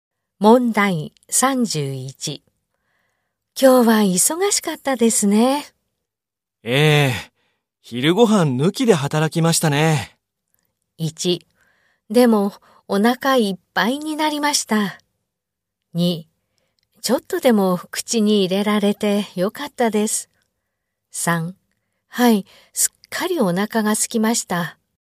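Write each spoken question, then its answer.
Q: 今日は忙しかったですね。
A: 3: はい、すっかりお腹が空きました。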